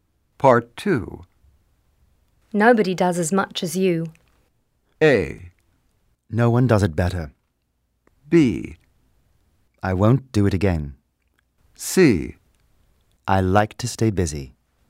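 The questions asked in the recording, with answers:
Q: Nobody does as much as you.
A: C: I like to stay busy.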